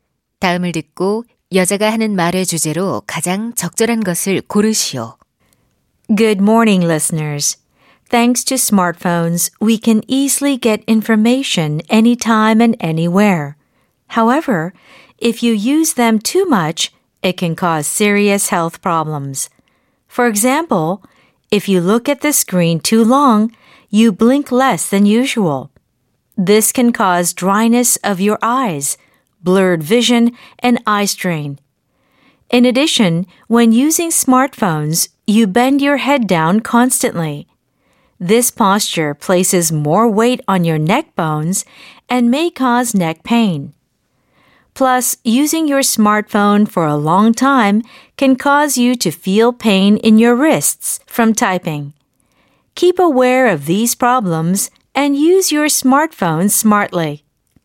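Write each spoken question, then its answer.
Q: 다음을 듣고 여자가 하는 말의 주제로 가장 적절한 것을 고르시오.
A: 스마트폰 과다 사용이 일으키는 건강 문제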